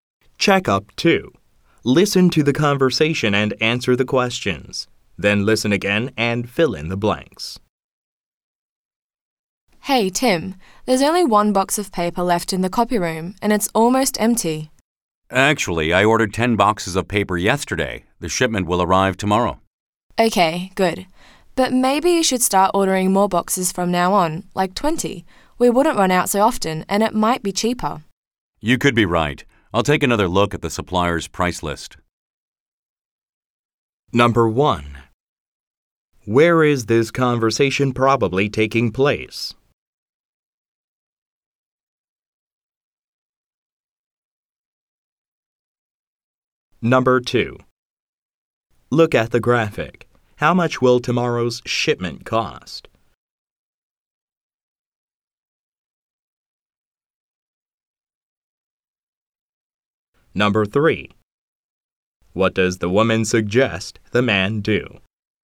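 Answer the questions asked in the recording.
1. In an office
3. Order more boxes of paper at a time, like 20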